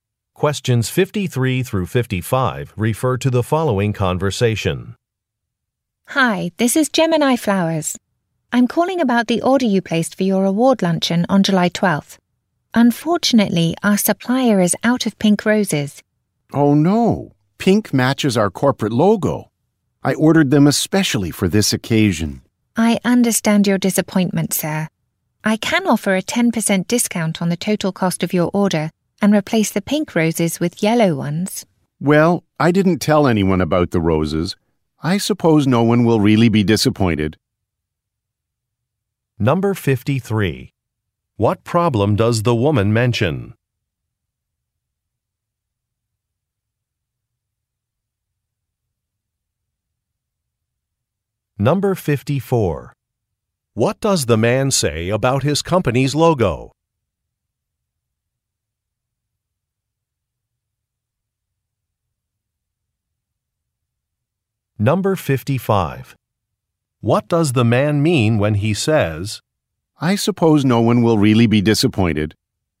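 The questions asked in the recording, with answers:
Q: What problem does the woman mention?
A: The supplier is out of pink roses

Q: What does the man say about his company's logo?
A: It is pink

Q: What does the man mean when he says,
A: He accepts the substitution (yellow roses)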